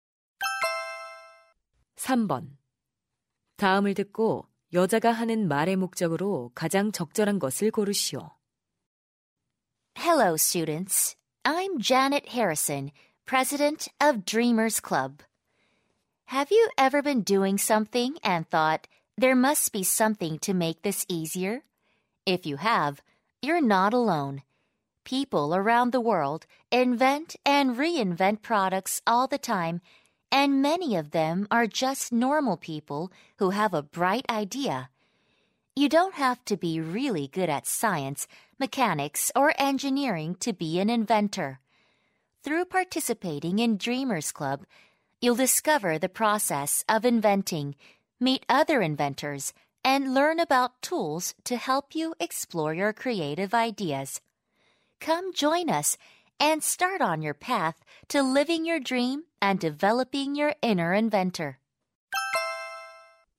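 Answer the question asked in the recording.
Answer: Dreamers Club 가입을 권유하려고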